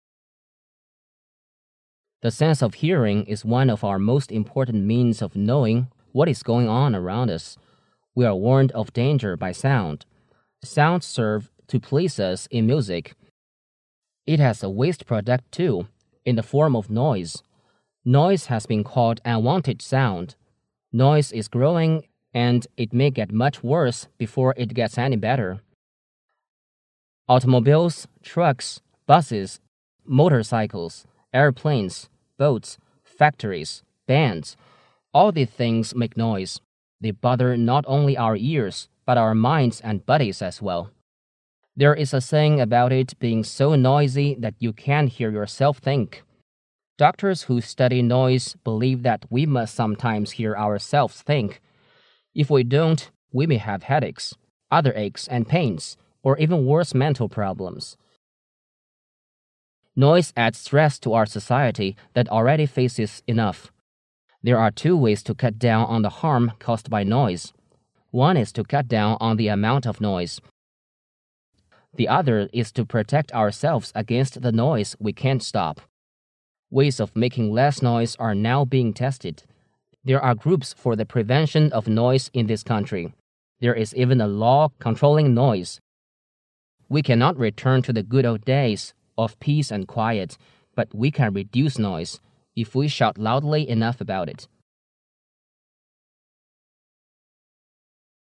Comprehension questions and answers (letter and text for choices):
Questions 22-25 are based on the following monologue.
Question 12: What does the speaker mainly talking about?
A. Pollution.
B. Human voice.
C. Good old days.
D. None of the above.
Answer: A. Pollution.

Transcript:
A B C D A [听力原文] The sense of hearing is one of our most important means of knowing what is going on around us. We are warned of danger by sound. Sounds serve to please us in music. It has a waste product, too, in the form of noise. Noise has been called unwanted sound. Noise is growing and it may get much worse before it gets any better. Automobiles, trucks, buses, motorcycles, airplanes, boats, factories, bands—all these things make noise. They bother not only our ears but our minds and bodies as well. There is a saying about it being so noisy that you can't hear yourself think. Doctors who study noise believe that we must sometimes hear ourselves thin

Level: 公共英语三级